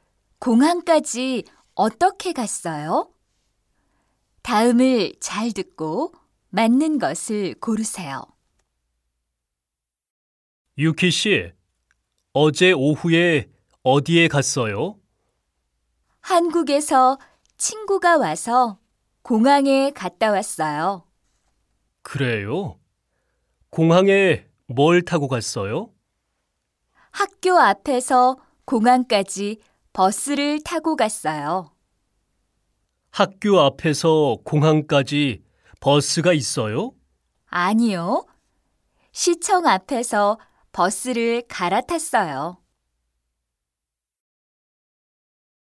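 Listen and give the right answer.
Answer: 버스를 타고 갔어요 (시청 앞에서 갈아탔어요)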